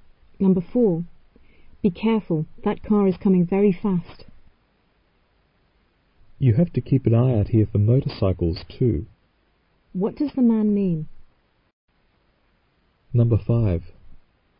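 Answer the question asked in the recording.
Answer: They must watch out for motorcycles too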